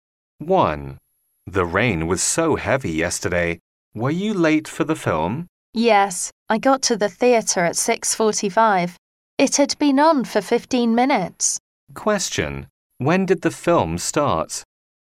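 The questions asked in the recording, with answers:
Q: When did the film start?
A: At 6:30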